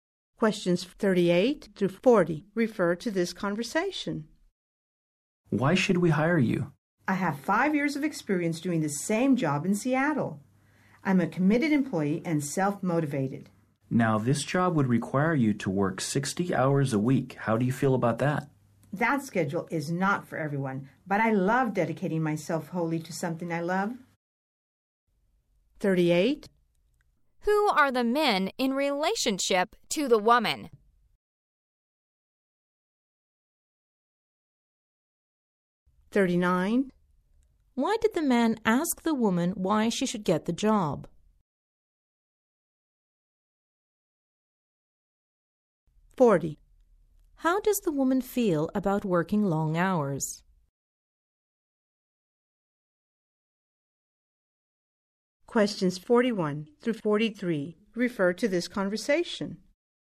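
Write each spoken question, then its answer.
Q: How does the woman feel about working long hours?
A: She is happy to; she loves dedicating herself to something she loves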